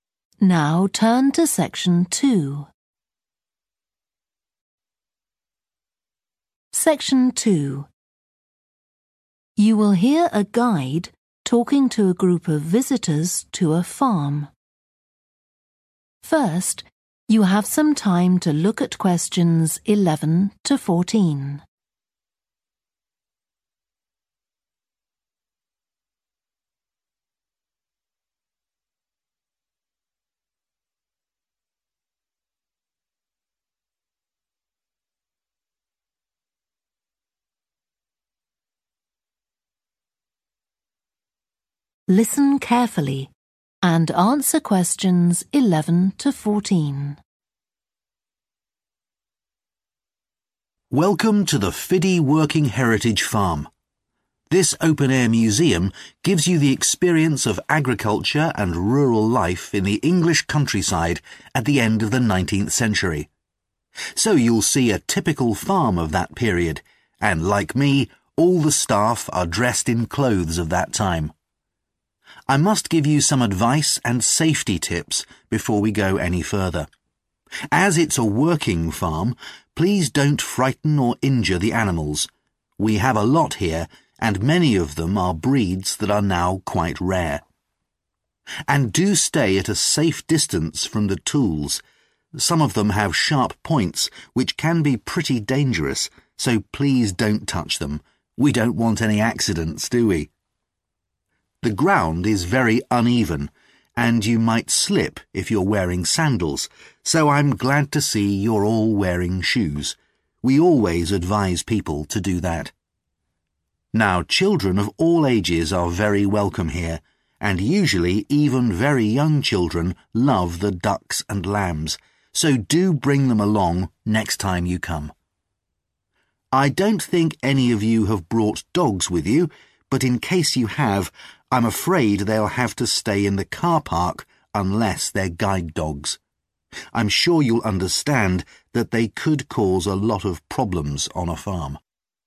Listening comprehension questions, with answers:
Complete the notes below. Write ONE WORD for each answer.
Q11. Take care not to harm any (11)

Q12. Not touch any (12)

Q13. Wear (13)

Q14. Not bring (14) into the farm, with certain exceptions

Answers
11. animals
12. tools
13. shoes
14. dogs